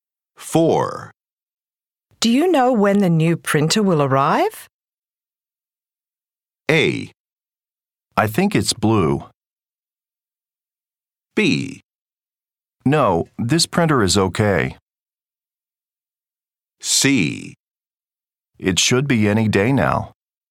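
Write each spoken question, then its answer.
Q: Do you know when the new printer will arrive?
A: C: It should be any day now.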